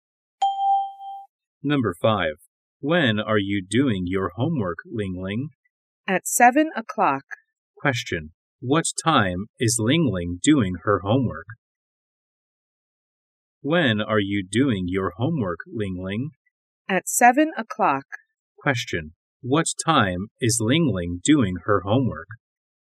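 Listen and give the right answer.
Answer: At 7 o'clock.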